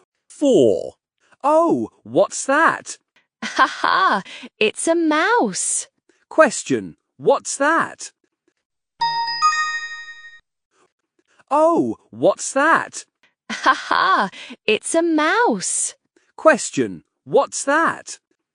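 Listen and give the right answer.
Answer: a mouse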